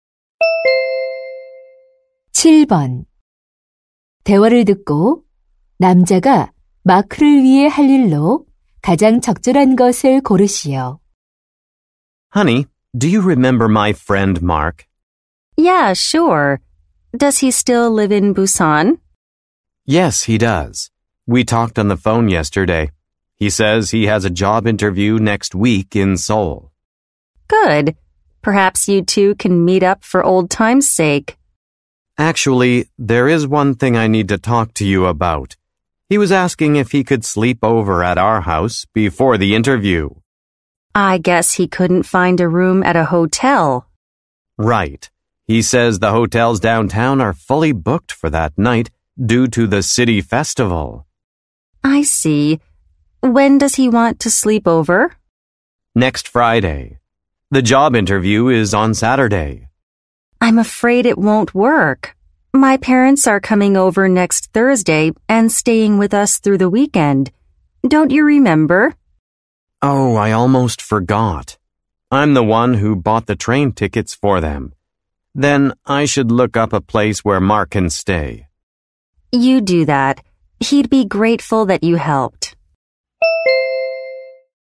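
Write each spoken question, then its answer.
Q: 대화를 듣고 남자가 마크를 위해 할 일로 가장 적절한 것을 고르시오.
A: 마크가 머물 숙소 알아보기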